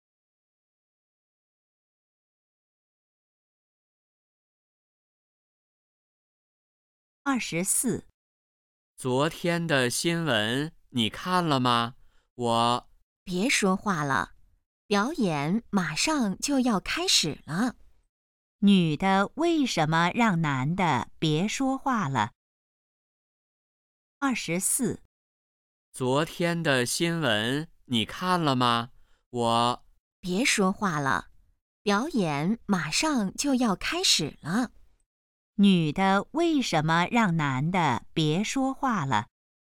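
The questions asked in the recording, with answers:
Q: 女的为什么让男的别说话了?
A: 表演马上要开始了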